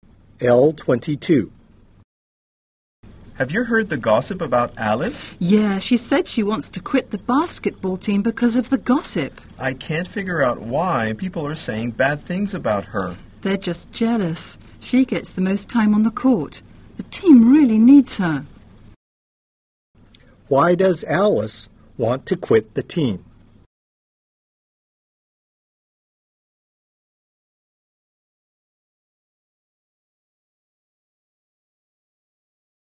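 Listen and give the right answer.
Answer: Because of the gossip about her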